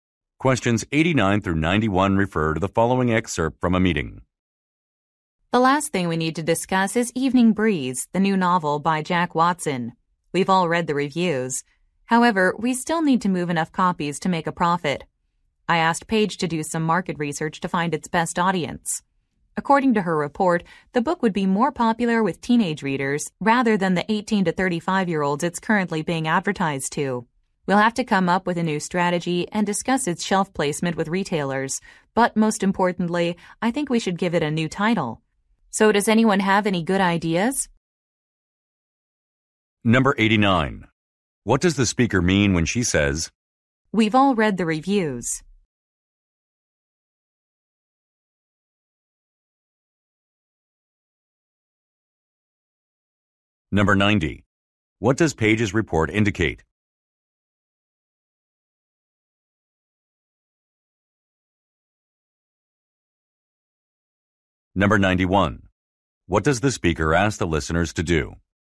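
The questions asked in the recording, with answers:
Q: What does Paige's report indicate?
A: The book would be more popular with teenage readers

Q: What does the speaker ask the listeners to do?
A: Suggest a new title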